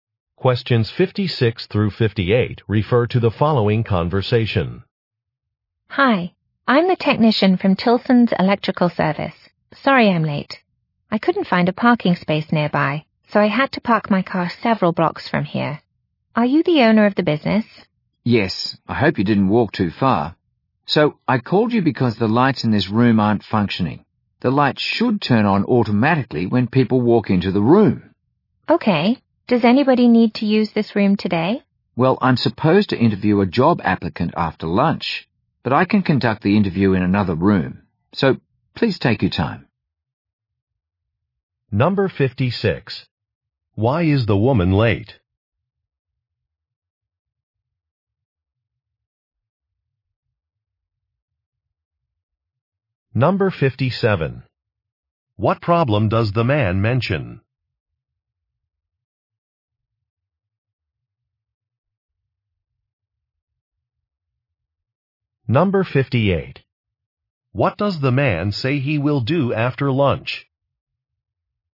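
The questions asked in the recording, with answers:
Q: Why is the woman late?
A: She couldn't find a parking space nearby

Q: What problem does the man mention?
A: The lights in the room aren't working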